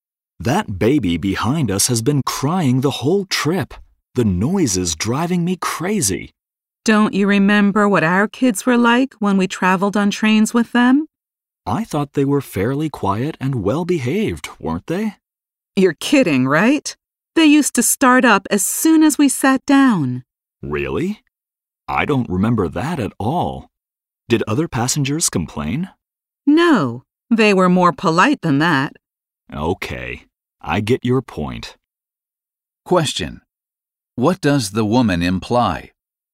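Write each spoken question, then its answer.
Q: What does the woman imply?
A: The man should be more tolerant of the crying baby, because their own children were noisy on trains too.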